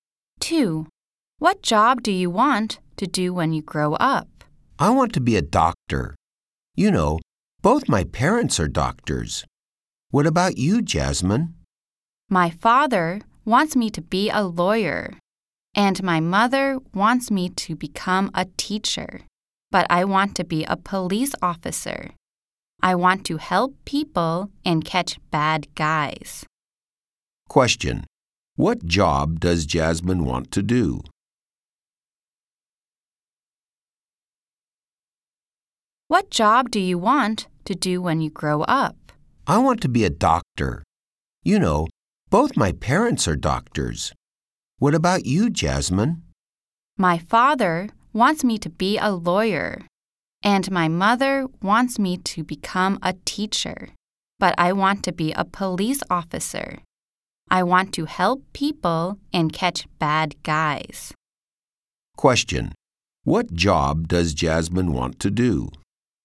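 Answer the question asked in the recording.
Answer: A police officer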